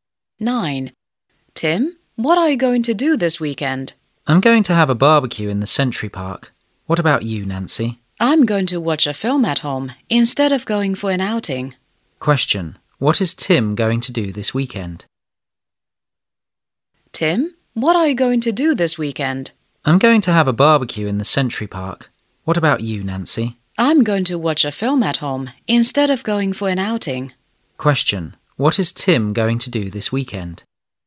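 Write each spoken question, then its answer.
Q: What is Tim going to do this weekend?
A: Have a barbecue in the Century Park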